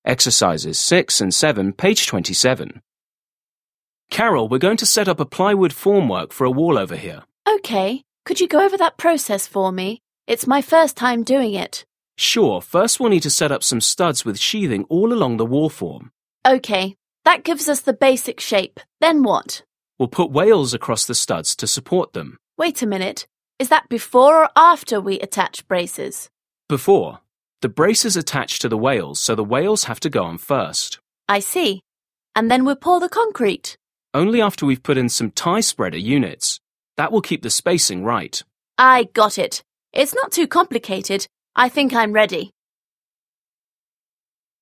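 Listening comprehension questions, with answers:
7. Listen again and complete the conversation.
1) Workers 2: Okay. Could you 1______ _______ that process for me? It's my first time doing it.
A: go over

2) Worker 1: Sure. First we'll 2 _____ _____ _____ _____ some studs with sheathing all along the wall form.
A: need to set up

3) Worker 2: Okay. That gives us the basic shape.3 ______ ______?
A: Then what

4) Worker 1: We'll put wales 4 _____ _____ _____ to support them.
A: across the studs

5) Worker 2: Wait a minute. Is that 5 _____ _____ _____ we attach braces?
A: before or after

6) Worker 1: Before. The braces attach to the wales, so the wales have to 6 _____ _____ _____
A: go on first

6. Listen to a conversation between two construction workers. Mark the following statements as true (T) or false (F).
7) The woman has not set up a plywood wall form before.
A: T

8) Braces are attached before wales.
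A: F

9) The sheathing is attached after the tie-spreader units.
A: F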